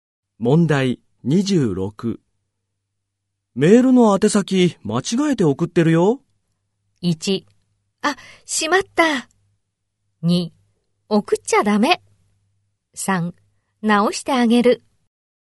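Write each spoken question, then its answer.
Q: メールの宛先間違えて送ってるよ。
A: 1: あ、しまった。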